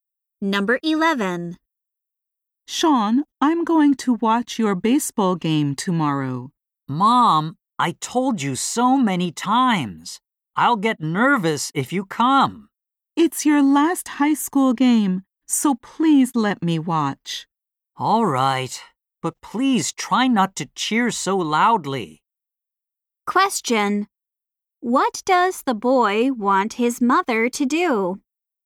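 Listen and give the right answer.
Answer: Not cheer loudly at his game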